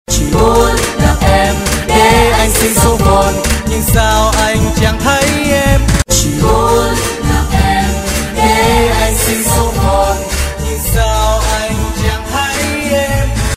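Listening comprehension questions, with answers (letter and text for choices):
F. Translate the requested excerpt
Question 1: Which part says "I just want to meet you"?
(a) thấy em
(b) gặp em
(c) anh xin số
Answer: (b) gặp em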